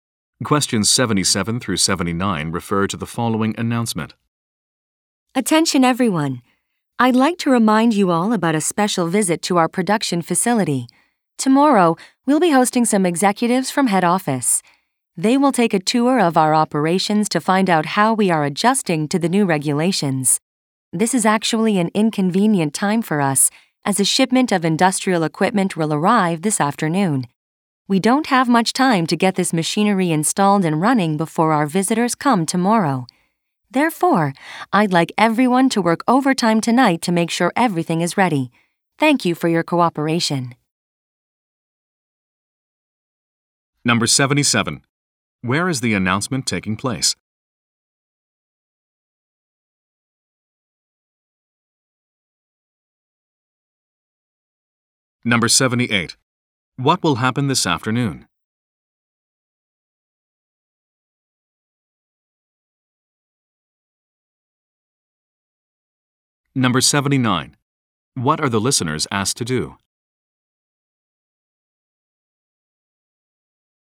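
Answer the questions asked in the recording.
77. At a production facility
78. A shipment of industrial equipment will arrive
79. Work overtime tonight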